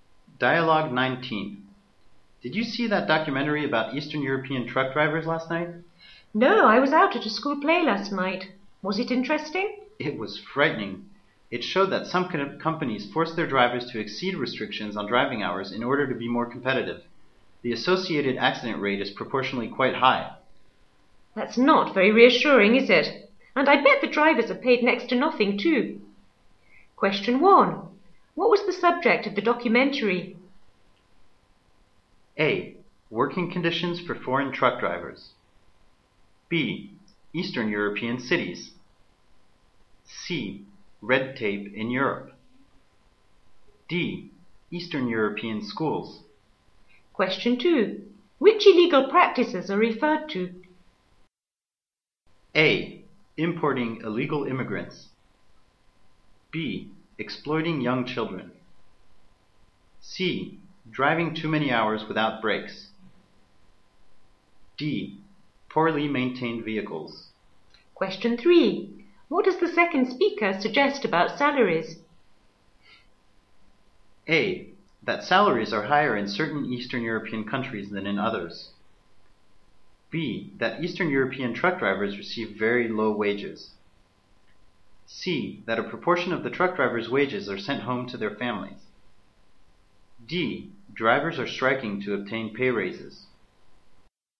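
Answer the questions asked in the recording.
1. A: Working conditions for foreign truck drivers.
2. C: Driving too many hours without breaks.
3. B: That Eastern European truck drivers receive very low wages.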